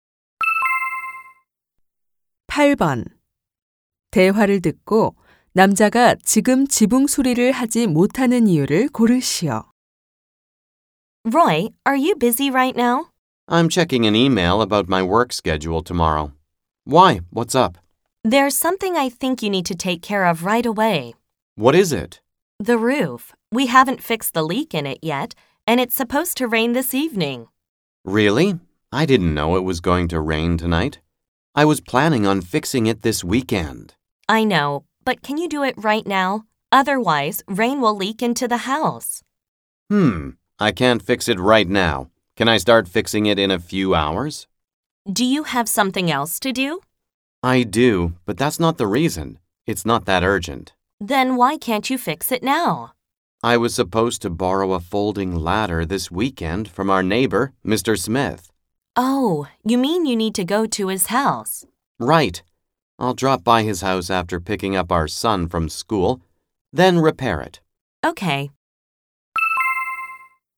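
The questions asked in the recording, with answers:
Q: 대화를 듣고 남자가 지금 지붕 수리를 하지 못하는 이유를 고르시오.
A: 이웃에게서 접이식 사다리를 빌려야 해서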